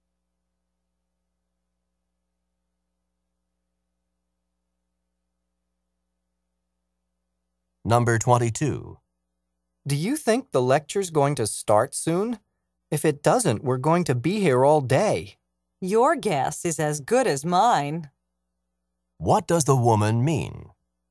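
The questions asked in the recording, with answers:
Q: What does the woman mean?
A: She doesn't know when the lecture will start.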